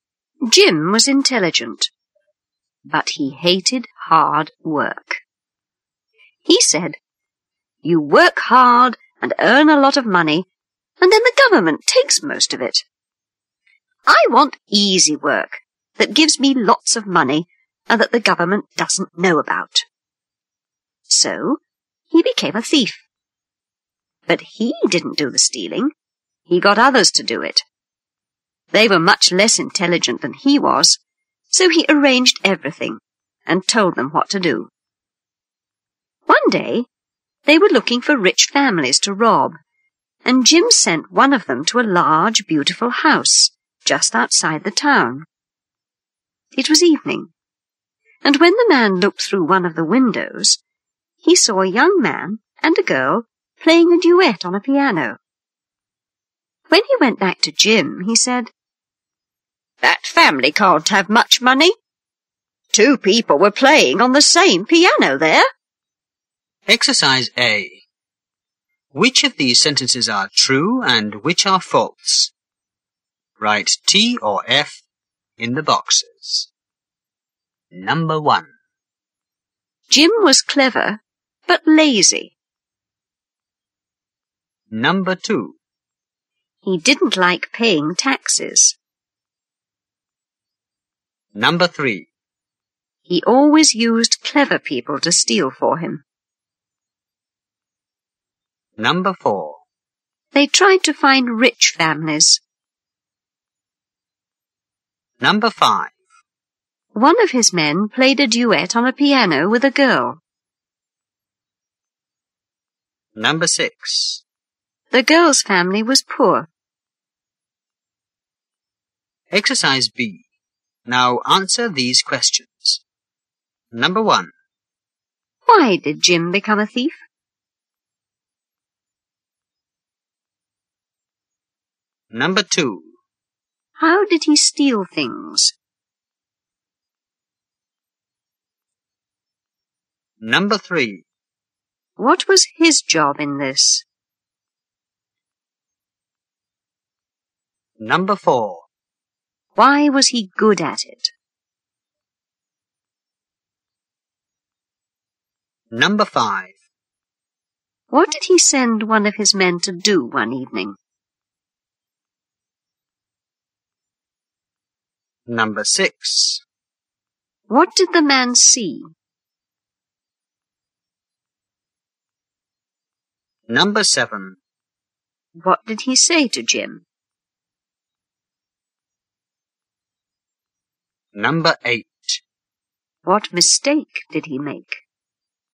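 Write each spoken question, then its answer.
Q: Jim was clever, but lazy.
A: True

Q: He didn't like paying taxes.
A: True

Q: He always used clever people to steal for him.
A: False

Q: They tried to find rich families.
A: True

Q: One of his men played a duet on a piano with a girl.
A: False

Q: Why did Jim become a thief?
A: He wanted easy work that paid a lot of money and that the government didn't know about.

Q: How did he steal things?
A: He got others to do the stealing for him.

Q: What was his job in this?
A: He arranged everything and told them what to do.

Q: Why was he good at it?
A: He was more intelligent than the others.

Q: What did he send one of his men to do one evening?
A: To look at a large, beautiful house outside the town to see if the family was rich enough to rob.

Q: What did the man see?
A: A young man and a girl playing a duet on a piano.

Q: What did he say to Jim?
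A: That family can't have much money, because two people were playing on the same piano.

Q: What mistake did he make?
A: He thought two people played on one piano because the family was poor, but they were playing a duet.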